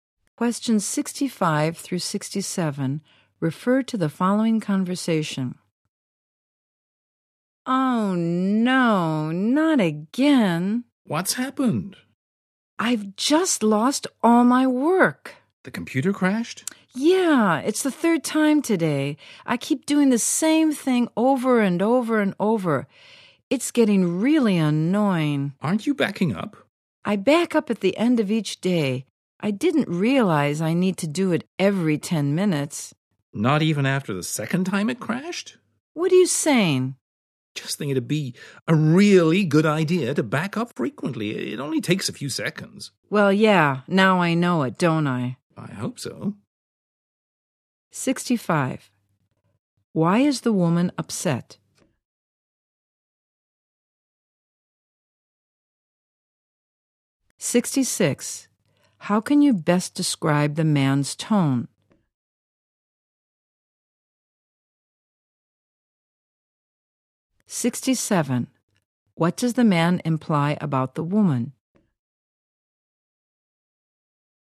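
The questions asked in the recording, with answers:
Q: Why is the woman upset?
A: Her computer crashed and she lost her work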